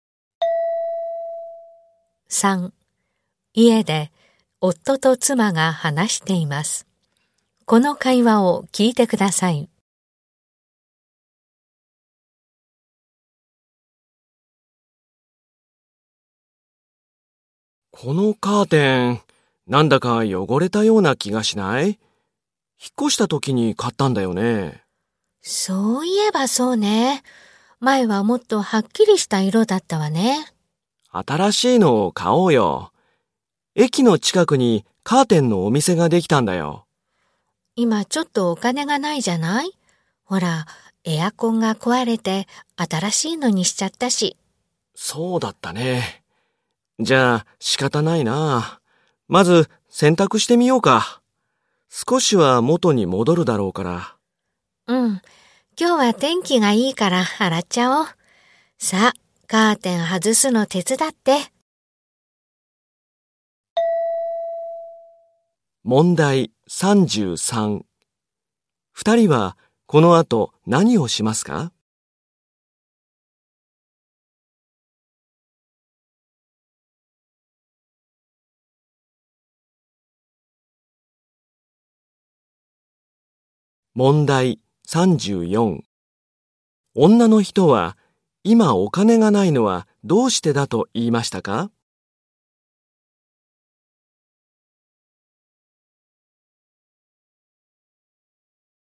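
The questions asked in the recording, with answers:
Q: 二人はこの後何をしますか?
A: カーテンを外して洗濯する

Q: 女の人は今お金がないのはどうしてだと言いましたか?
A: エアコンが壊れて新しいのを買ったから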